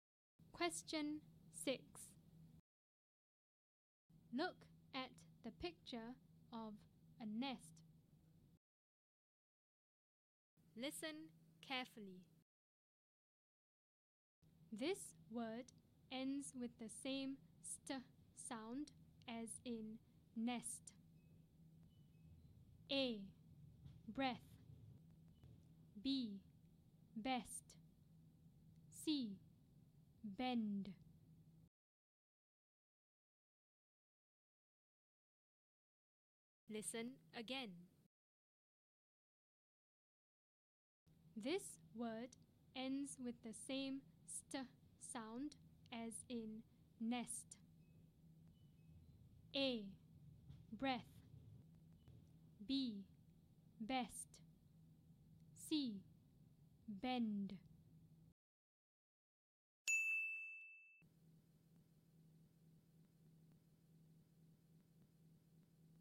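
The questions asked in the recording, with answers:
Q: This word ends with the same st sound as in nest.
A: B: Best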